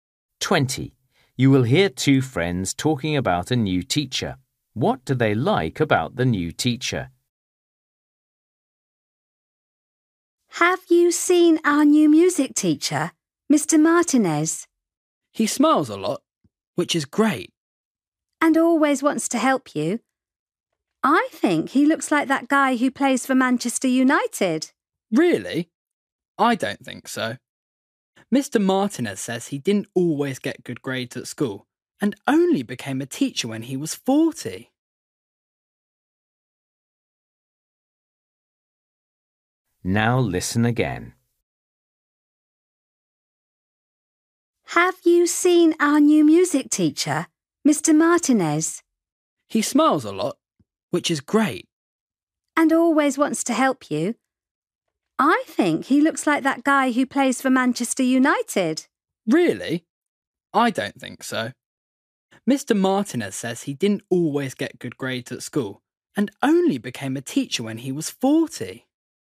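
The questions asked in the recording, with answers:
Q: What do they like about the new teacher?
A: He smiles a lot and always wants to help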